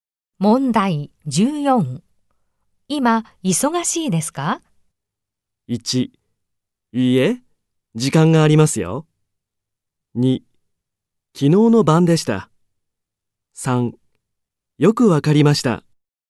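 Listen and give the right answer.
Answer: 1: いいえ、時間がありますよ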